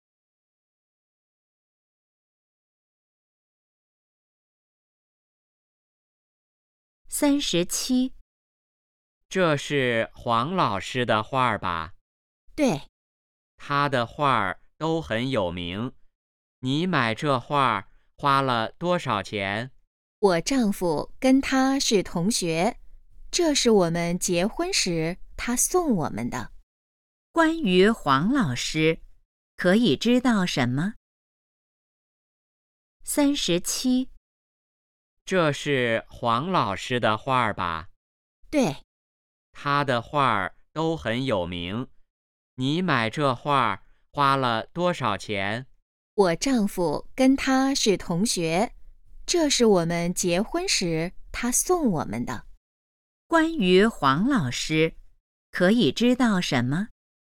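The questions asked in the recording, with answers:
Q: 关于黄老师,可以知道什么?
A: 他的画很有名,是女的丈夫的同学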